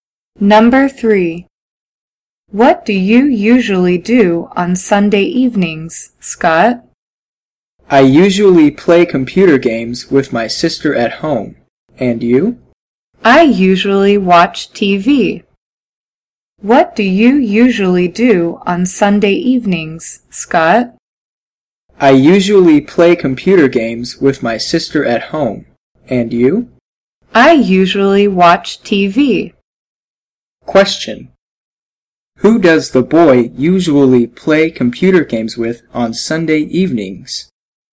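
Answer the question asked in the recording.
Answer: His sister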